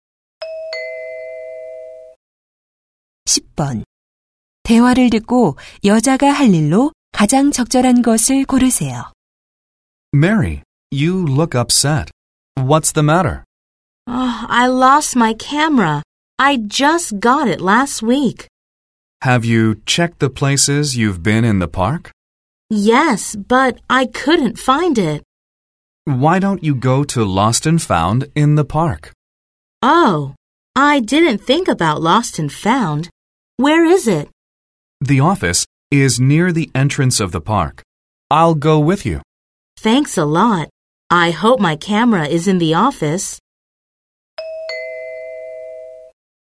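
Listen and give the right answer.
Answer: 분실물 보관소에 가기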